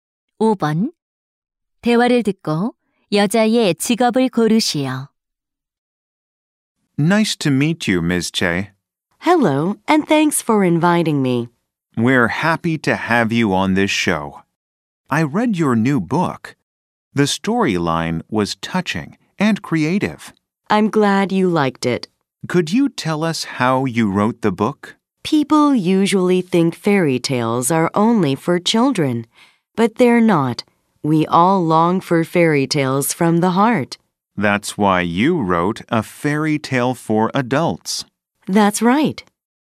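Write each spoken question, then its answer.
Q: 대화를 듣고 여자의 직업을 고르시오.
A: 작가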